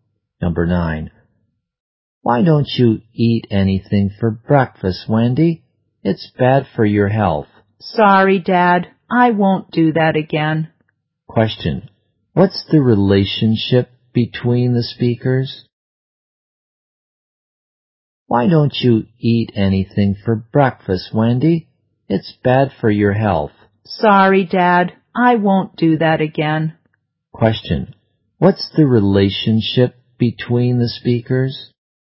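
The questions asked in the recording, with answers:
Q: What's the relationship between the speakers?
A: Father and daughter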